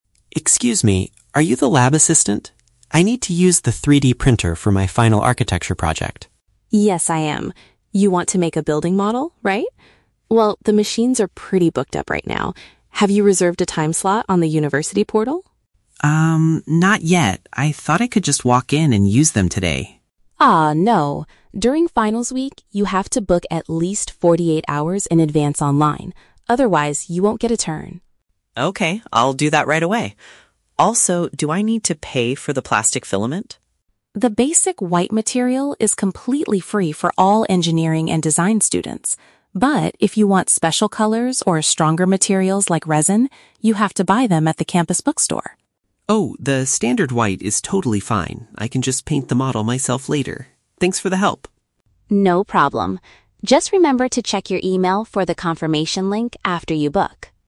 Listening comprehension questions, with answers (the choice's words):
Listen to a conversation between a student and a lab assistant, then choose the correct answer (A, B, or C) for each question.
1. How does the student need to secure a turn to use the 3D printer?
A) By showing up at the laboratory in person.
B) By making a reservation on the internet beforehand.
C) By calling the campus bookstore to schedule a time.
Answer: By making a reservation on the internet beforehand.

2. What is the policy regarding the printing materials?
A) The standard white plastic is provided without charge.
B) Students must purchase all plastics at the bookstore.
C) The university offers free colored resin for final projects.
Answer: The standard white plastic is provided without charge.

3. What does the student decide to do about his project's appearance?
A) He will buy special colored plastics to make it look better.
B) He will change his design because the machines are busy.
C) He will use the free material and add color to it on his own.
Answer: He will use the free material and add color to it on his own.

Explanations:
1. The lab assistant says he has to "book at least 48 hours in advance online." "Book in advance online" is a paraphrase of "making a reservation on the internet beforehand." Why the trap is wrong: Option (A) is the trap. Liam thought he could "just walk in" (show up in person), but Chloe explicitly says "no" to this idea. Option (C) is a trap because the bookstore is mentioned later for buying materials, not for scheduling.
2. Chloe states that "The basic white material is completely free." "Provided without charge" is a synonym for "completely free." Why the trap is wrong: Option (B) is the trap. Students only have to buy special colors or resin at the bookstore, not all plastics. Option (C) is also a trap because the resin and special colors are not free.
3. Liam says "the standard white is totally fine" and that he "can just paint the model myself later." Why the trap is wrong: Option (A) is the trap. Chloe offers the option of special colors, but Liam rejects it because he can paint the standard one. Option (B) is a plausible distraction, but he never mentions changing his design, he just says he will book a time right away.

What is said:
Liam: Excuse me, are you the lab assistant? I need to use the 3D printer for my final architecture project.
Chloe: Yes, I am. You want to make a building model, right? Well, the machines are pretty booked up right now. Have you reserved a time slot on the university portal?
Liam: Um, not yet. I thought I could just walk in and use them today.
Chloe: Ah, no. During finals week, you have to book at least 48 hours in advance online. Otherwise, you won't get a turn.
Liam: Okay, I'll do that right away. Also, do I need to pay for the plastic filament?
Chloe: The basic white material is completely free for all engineering and design students. But, if you want special colors or stronger materials like resin, you have to buy them at the campus bookstore.
Liam: Oh, the standard white is totally fine. I can just paint the model myself later. Thanks for the help!
Chloe: No problem. Just remember to check your email for the confirmation link after you book!